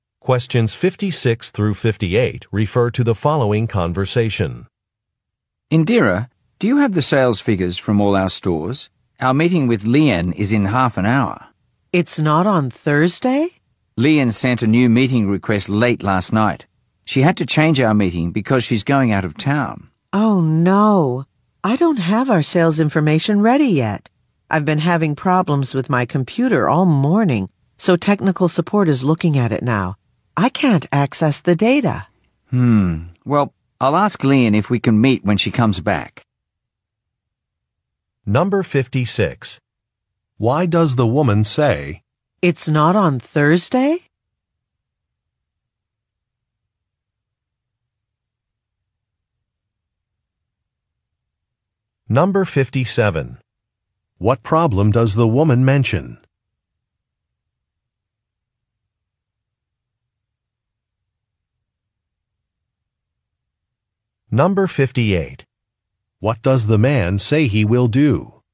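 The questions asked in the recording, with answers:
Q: Why does the woman say, "It's not on Thursday"?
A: She is surprised that the meeting time has changed.

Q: What problem does the woman mention?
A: Her computer isn't working, so she can't access the sales data.

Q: What does the man say he will do?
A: Ask Lien if they can meet when she comes back.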